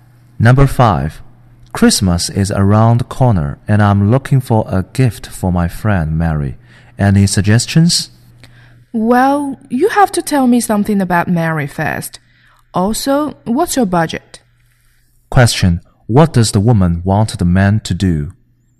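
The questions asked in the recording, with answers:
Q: What does the woman want the man to do?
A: Tell her about Mary and his budget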